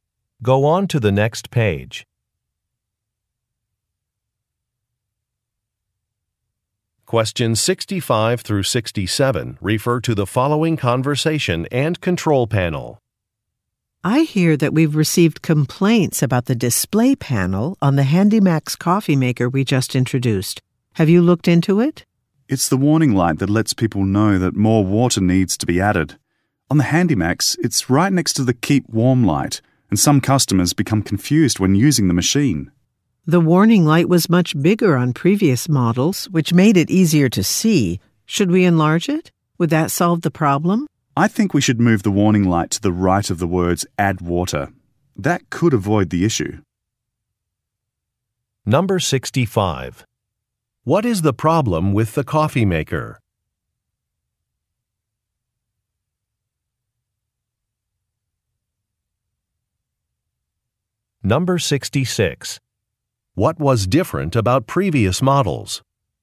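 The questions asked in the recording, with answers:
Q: What is the problem with the coffee maker?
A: The warning light confuses customers

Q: What was different about previous models?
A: The warning light was bigger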